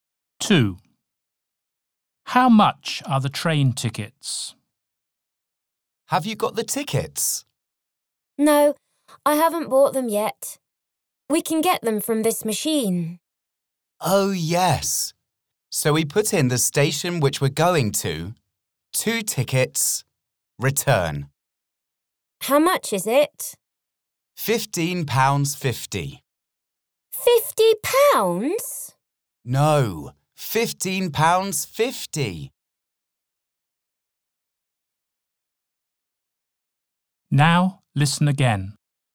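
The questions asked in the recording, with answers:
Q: How much are the train tickets?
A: £15.50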